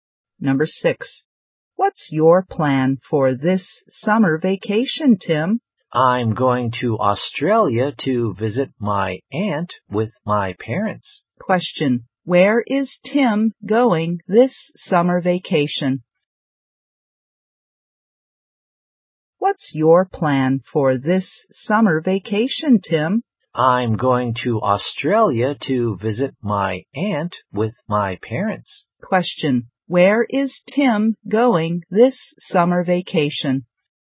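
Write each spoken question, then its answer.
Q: Where is Tim going this summer vacation?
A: To Australia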